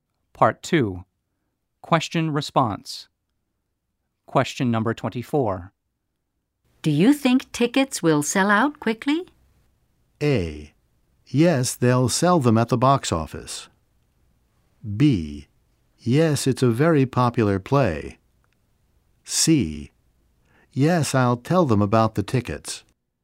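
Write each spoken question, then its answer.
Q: Do you think tickets will sell out quickly?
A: B: Yes, it's a very popular play.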